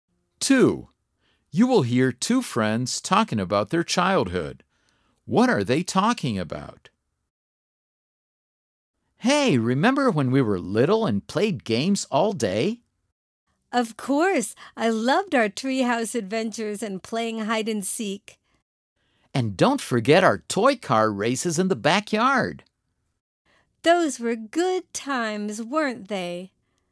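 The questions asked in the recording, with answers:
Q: What are they talking about?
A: Games they played as children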